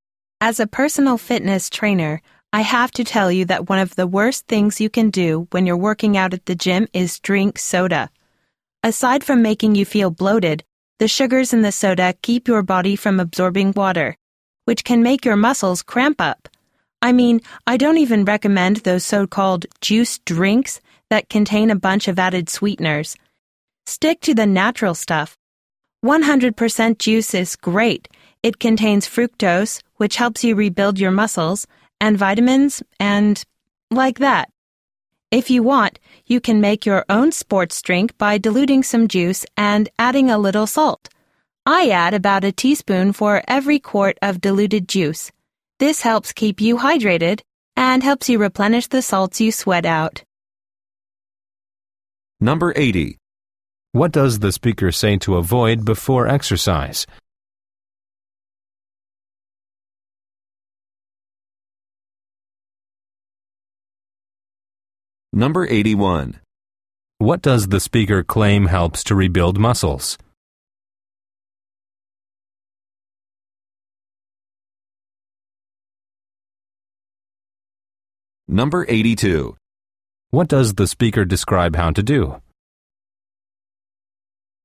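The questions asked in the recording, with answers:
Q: What does the speaker say to avoid before exercise?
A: Drinking soda

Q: What does the speaker claim helps to rebuild muscles?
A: Fructose in 100% juice

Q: What does the speaker describe how to do?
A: Make your own sports drink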